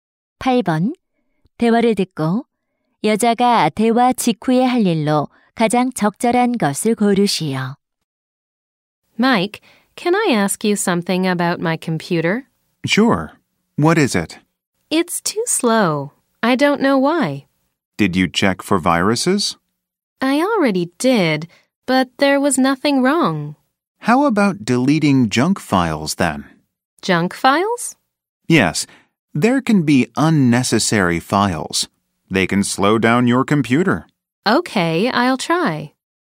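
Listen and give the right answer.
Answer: 불필요한 파일 삭제하기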